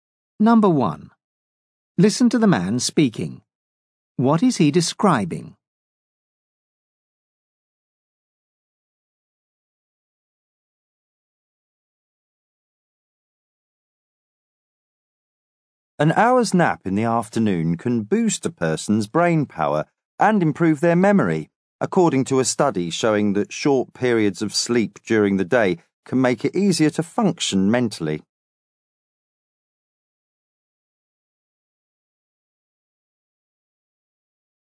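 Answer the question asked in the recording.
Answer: Research findings that an afternoon nap can boost brain power and memory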